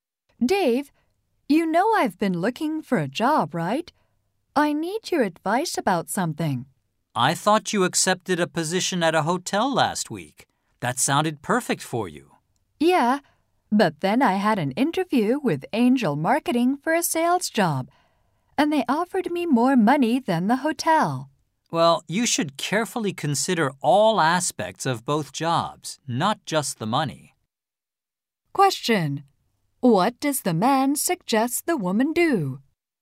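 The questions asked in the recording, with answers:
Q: What does the man suggest the woman do?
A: Carefully consider all aspects of both jobs, not just the money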